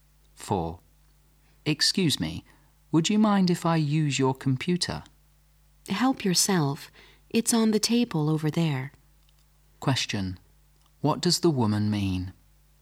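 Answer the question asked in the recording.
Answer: The man can use her computer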